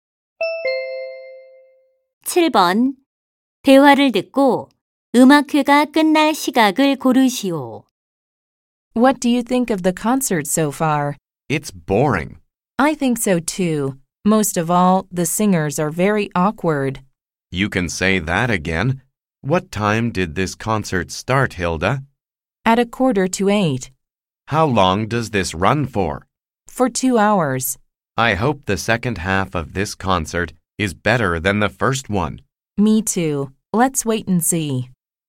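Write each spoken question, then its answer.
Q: 대화를 듣고 음악회가 끝날 시각을 고르시오.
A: 9시 45분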